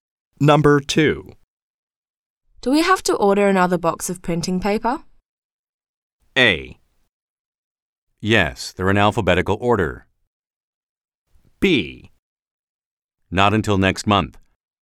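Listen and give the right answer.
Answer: B: Not until next month.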